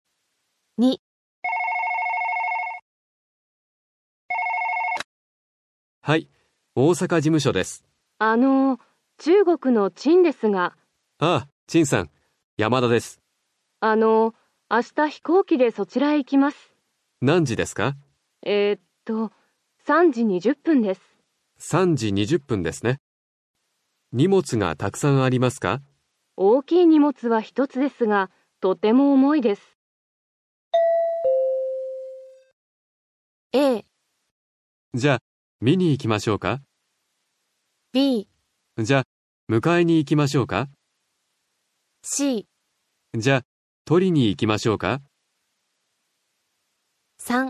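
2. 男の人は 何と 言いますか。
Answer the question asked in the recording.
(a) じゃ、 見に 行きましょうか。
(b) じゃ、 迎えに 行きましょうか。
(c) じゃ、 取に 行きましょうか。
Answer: (b) じゃ、 迎えに 行きましょうか。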